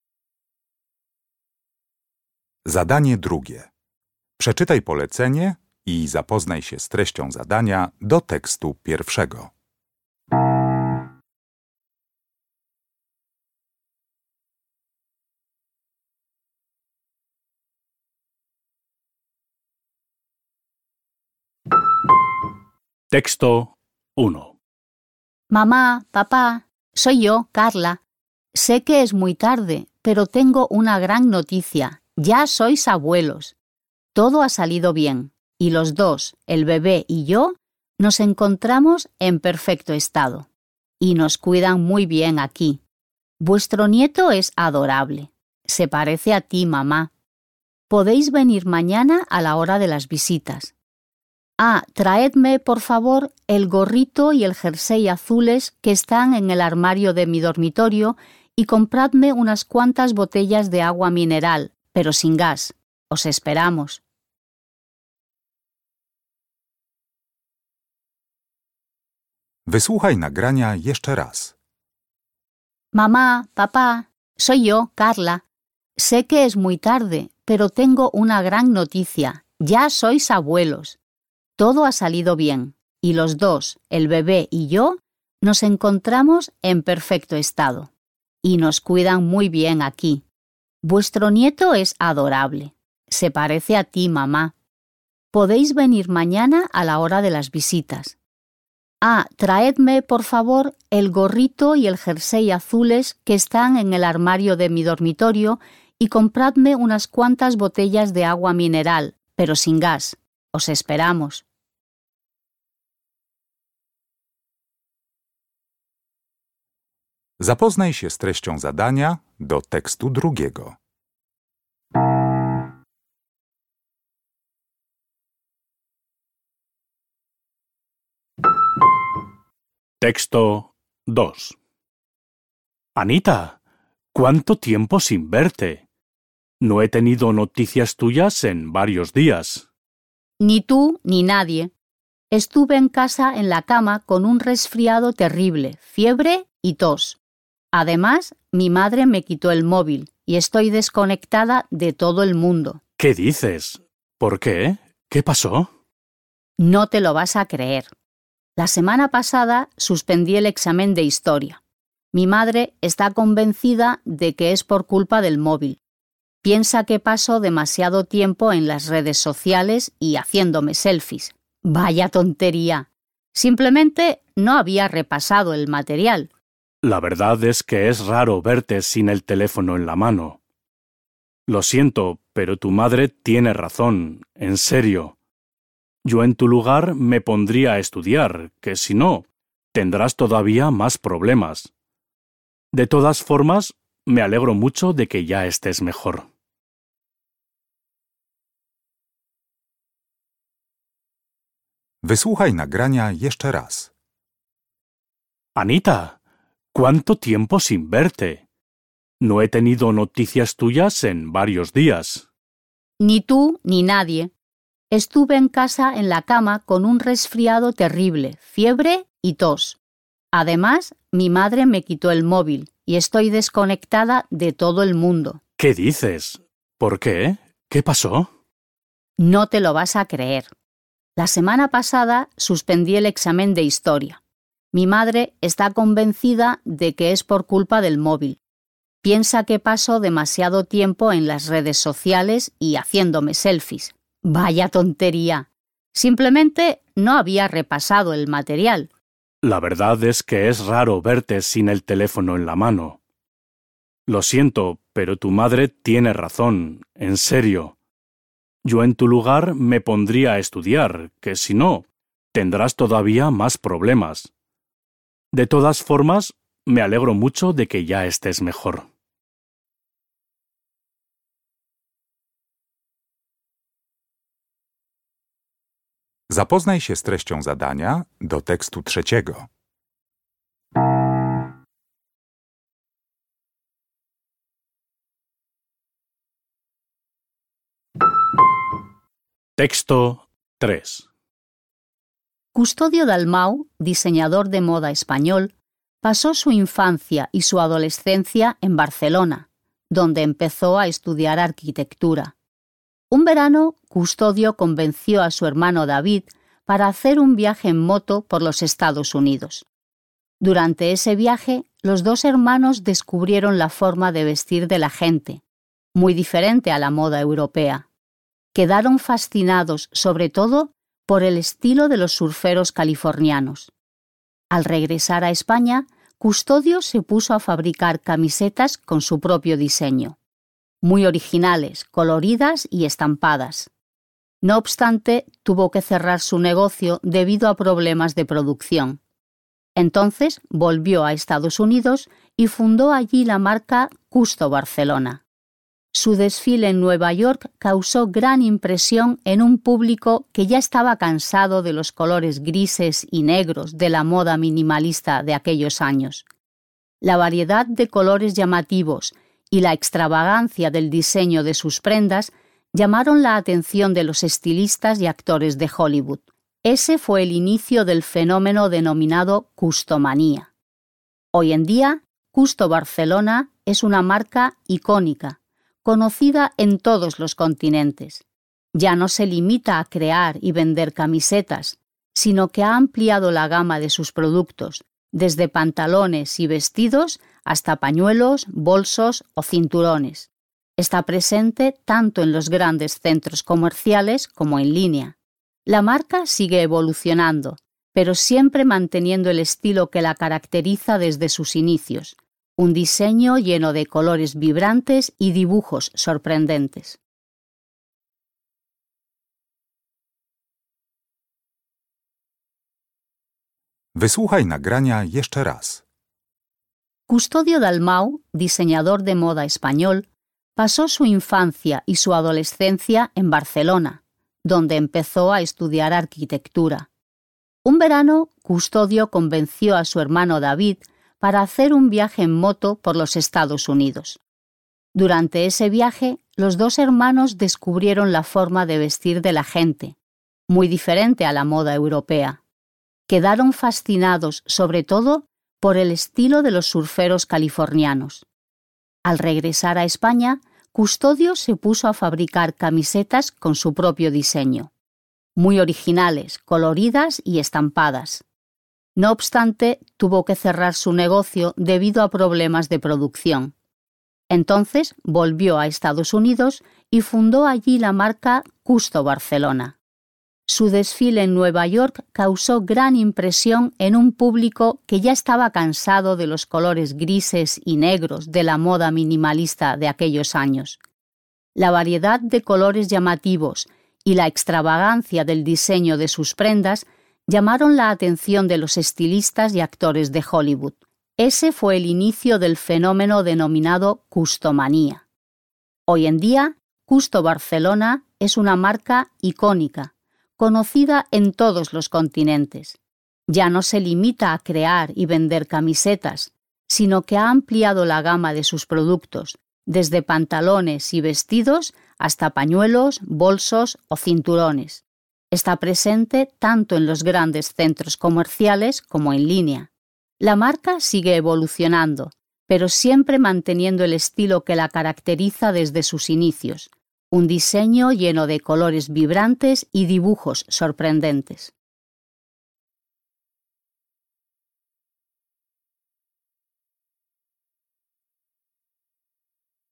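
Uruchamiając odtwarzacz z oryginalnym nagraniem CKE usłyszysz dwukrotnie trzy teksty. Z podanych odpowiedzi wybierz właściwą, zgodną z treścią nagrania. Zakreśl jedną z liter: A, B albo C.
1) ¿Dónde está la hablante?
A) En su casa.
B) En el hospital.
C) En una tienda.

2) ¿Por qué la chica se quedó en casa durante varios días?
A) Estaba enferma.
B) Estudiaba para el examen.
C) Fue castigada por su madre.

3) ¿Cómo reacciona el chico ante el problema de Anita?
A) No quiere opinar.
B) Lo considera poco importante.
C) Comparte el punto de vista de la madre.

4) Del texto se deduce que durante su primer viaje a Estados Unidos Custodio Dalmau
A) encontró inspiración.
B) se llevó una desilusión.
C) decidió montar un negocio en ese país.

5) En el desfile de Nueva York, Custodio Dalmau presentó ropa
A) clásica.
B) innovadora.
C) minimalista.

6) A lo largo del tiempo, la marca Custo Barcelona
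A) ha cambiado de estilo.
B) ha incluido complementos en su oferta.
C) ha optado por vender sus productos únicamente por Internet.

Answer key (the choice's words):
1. En el hospital.
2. Estaba enferma.
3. Comparte el punto de vista de la madre.
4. encontró inspiración.
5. innovadora.
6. ha incluido complementos en su oferta.

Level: Poziom: podstawowy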